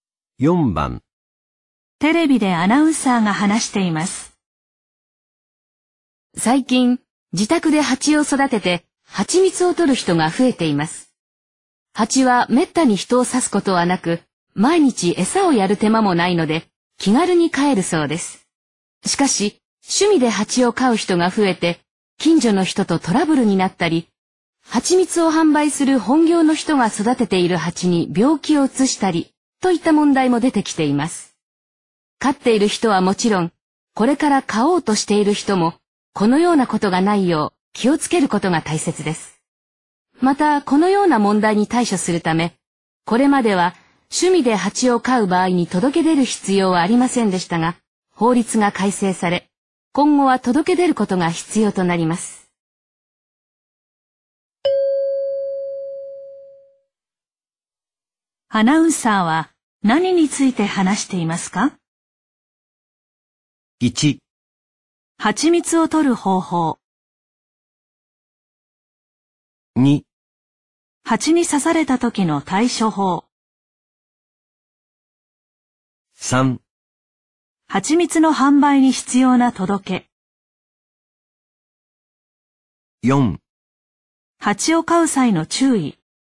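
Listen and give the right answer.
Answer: 4: 蜂を飼う際の注意。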